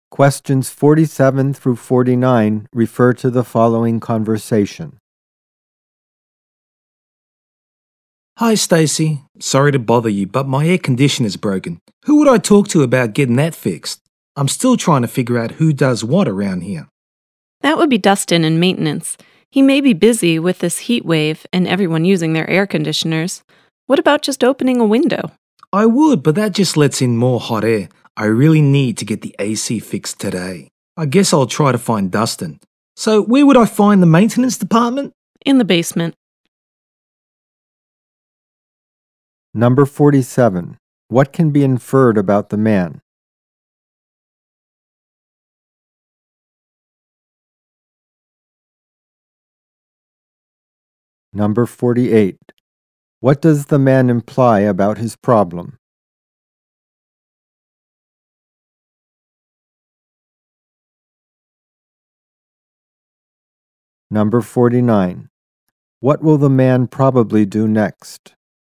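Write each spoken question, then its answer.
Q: What will the man probably do next?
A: Go to the basement to find Dustin in maintenance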